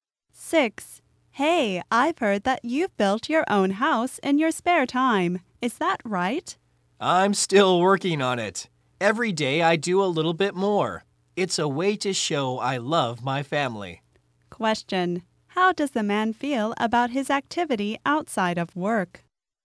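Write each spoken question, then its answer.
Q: how does the man feel about his activity outside of work?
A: It's a way to show he loves his family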